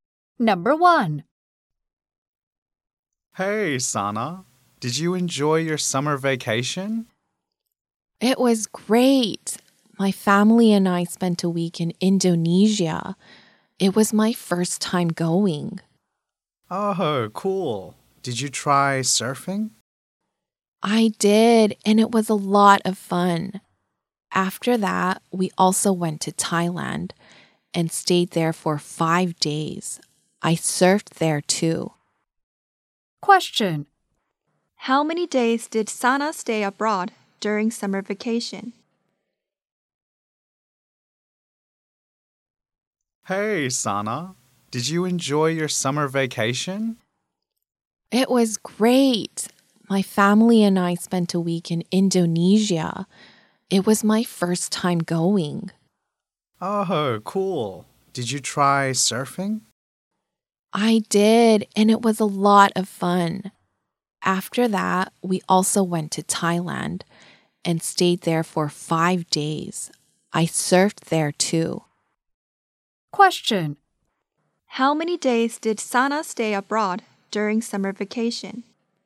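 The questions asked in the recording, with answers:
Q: How many days did Sana stay abroad during summer vacation?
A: 12 days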